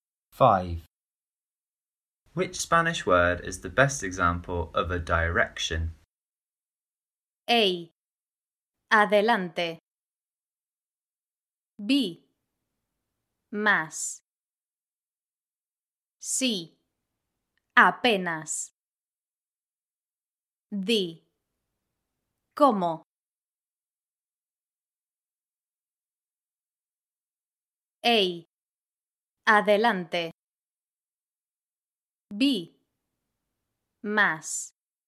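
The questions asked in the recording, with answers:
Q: Which Spanish word is the best example of a direction?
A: A: Adelante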